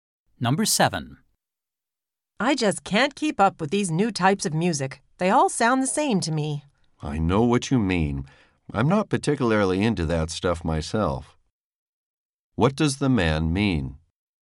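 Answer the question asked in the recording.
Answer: He doesn't like the new music much either.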